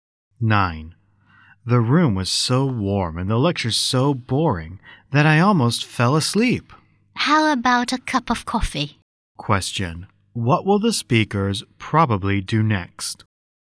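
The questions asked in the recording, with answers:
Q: What will the speakers probably do next?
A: Have a cup of coffee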